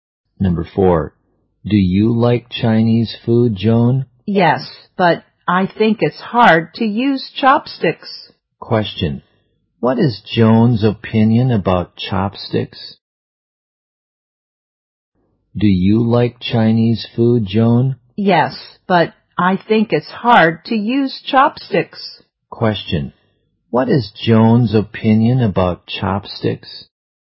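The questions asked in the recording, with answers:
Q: Question, what is Joan's opinion about chopsticks?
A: They are hard to use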